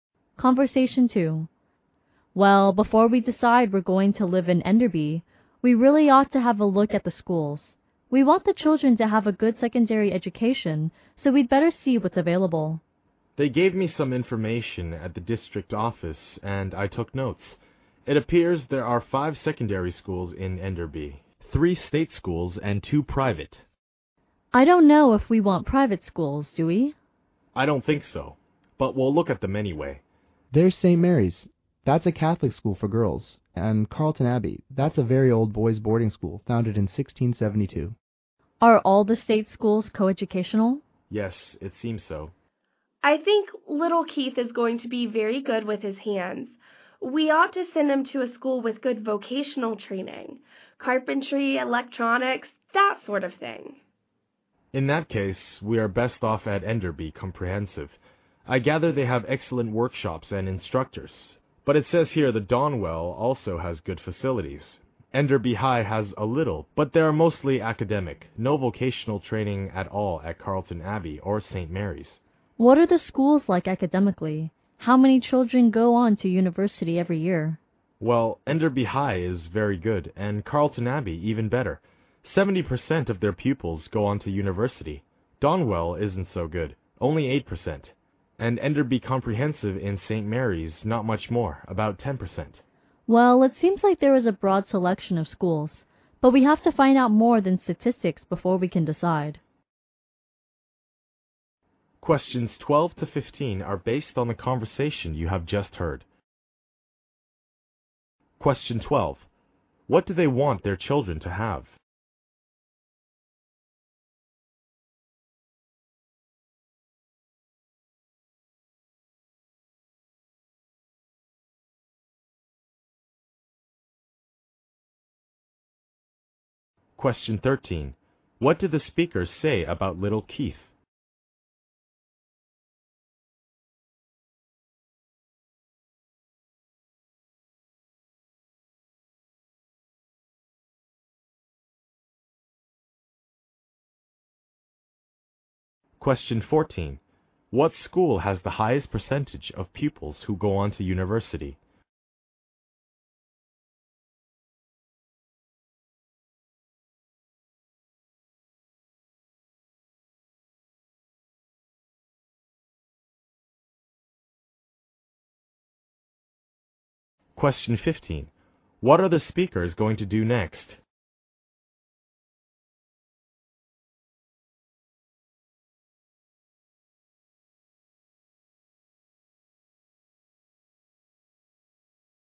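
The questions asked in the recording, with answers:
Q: What do they want their children to have?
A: A good secondary education.

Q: What did the speaker say about little Keith?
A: He will be good with his hands and should get vocational training.

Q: What school has the highest percentage of pupils who go on to university?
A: Carlton Abbey.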